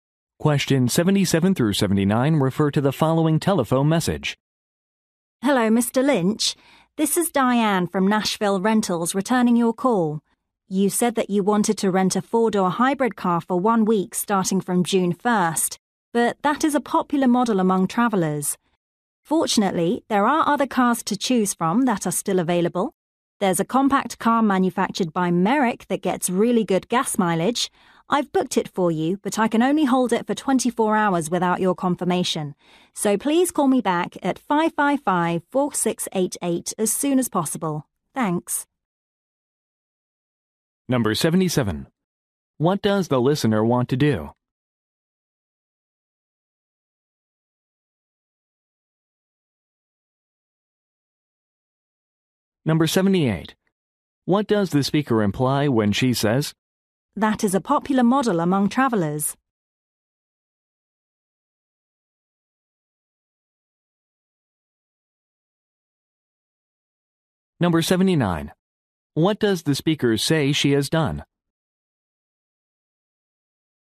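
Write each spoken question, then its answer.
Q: What does the listener want to do?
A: Rent a car

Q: What does the speaker imply when she says,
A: The hybrid car is not available

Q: What does the speaker say she has done?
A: Booked a compact car for him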